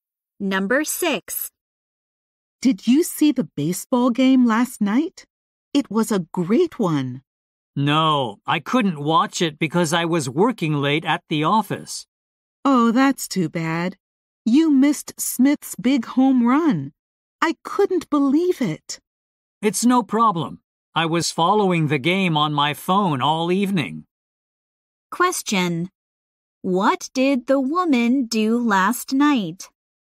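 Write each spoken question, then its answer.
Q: What did the woman do last night?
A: She worked late and followed the game on her phone.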